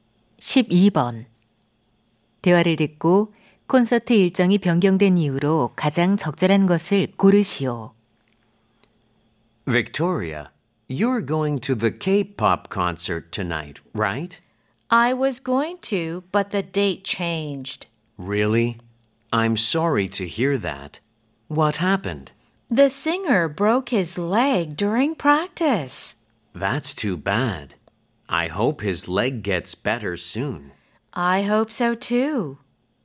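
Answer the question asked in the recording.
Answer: 가수가 연습 중 다리가 부러져서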